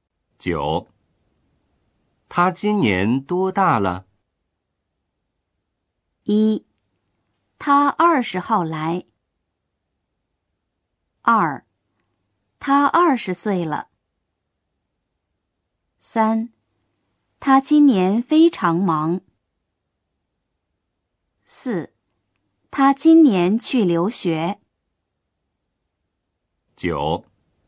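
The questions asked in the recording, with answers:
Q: 他今年多大了?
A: 2: 他二十岁了。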